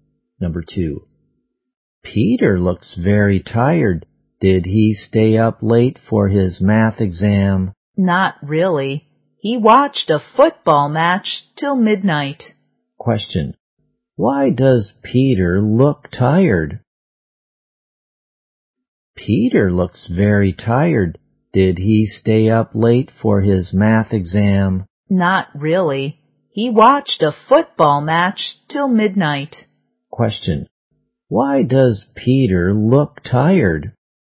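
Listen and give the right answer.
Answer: He watched a football match till midnight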